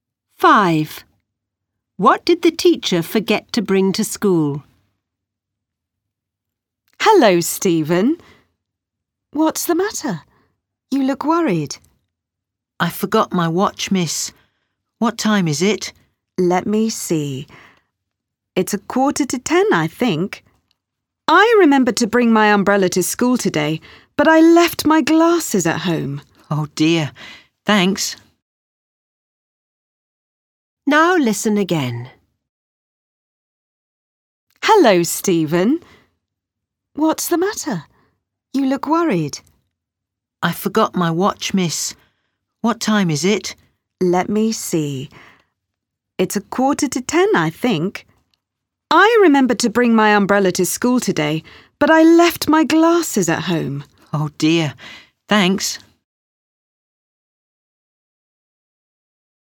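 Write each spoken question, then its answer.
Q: What did the teacher forget to bring to school?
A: Her glasses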